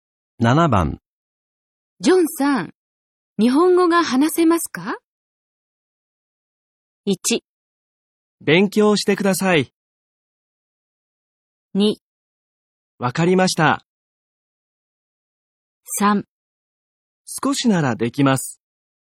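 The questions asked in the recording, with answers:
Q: ジョンさん、日本語が話せますか?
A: 3: 少しならできます。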